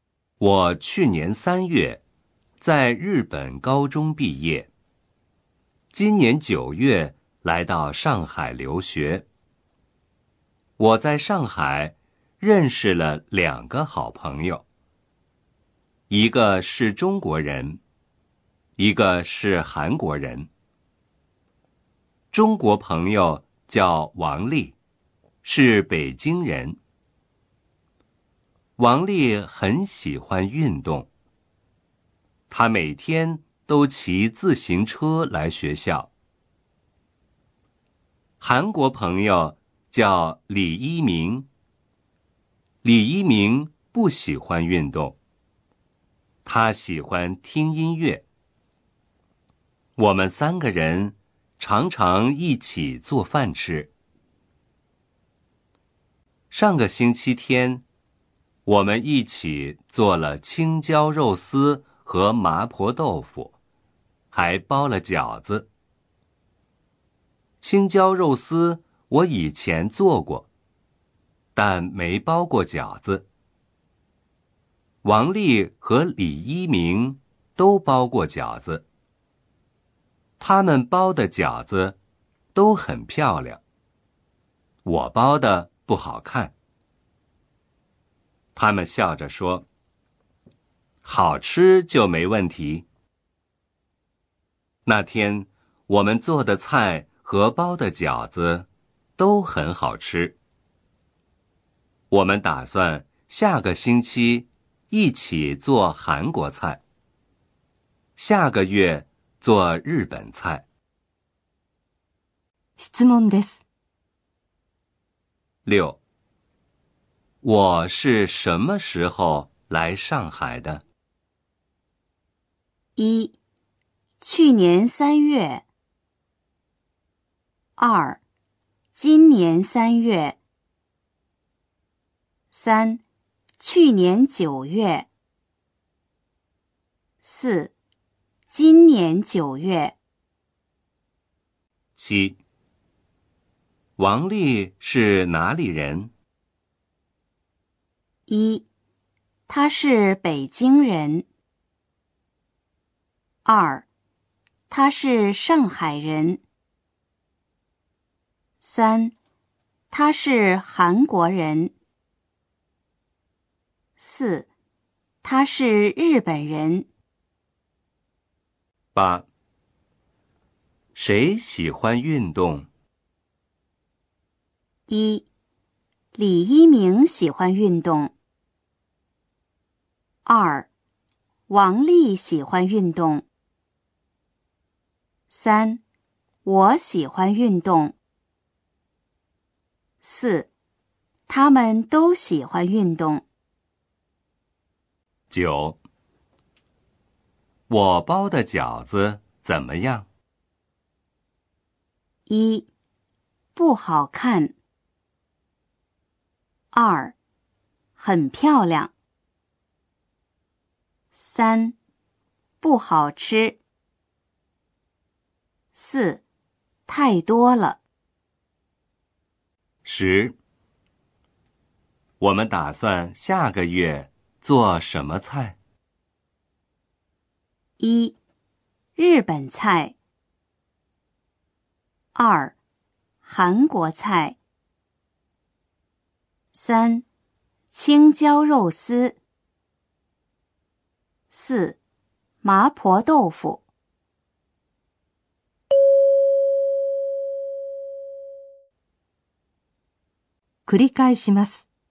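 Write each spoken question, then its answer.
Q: 我是什么时候来上海的?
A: 4: 今年九月。

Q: 王丽是哪里人?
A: 1: 她是北京人。

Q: 谁喜欢运动?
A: 2: 王丽喜欢运动。

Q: 我包的饺子怎么样?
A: 1: 不好看。

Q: 我们打算下个月做什么菜?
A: 1: 日本菜。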